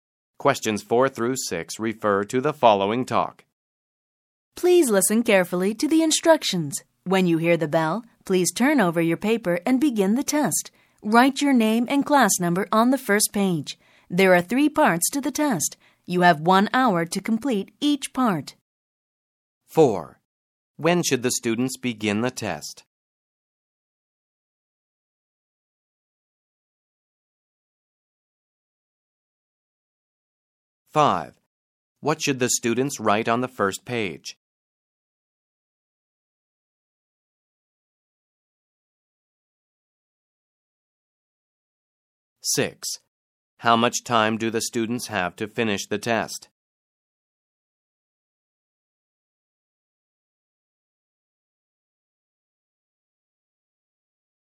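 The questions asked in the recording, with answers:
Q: When should the students begin the test?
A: When they hear the bell

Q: What should the students write on the first page?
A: Their name and class number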